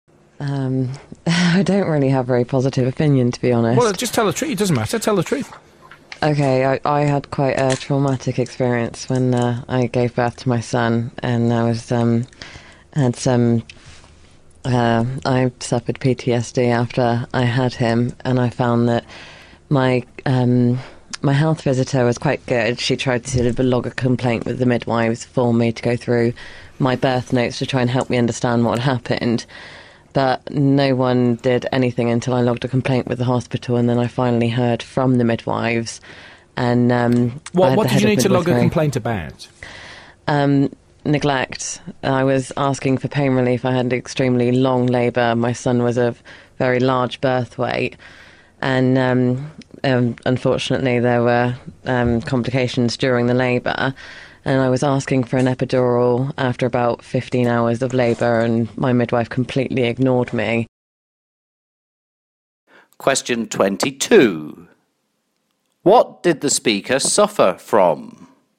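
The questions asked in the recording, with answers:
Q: What did the speaker suffer from?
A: PTSD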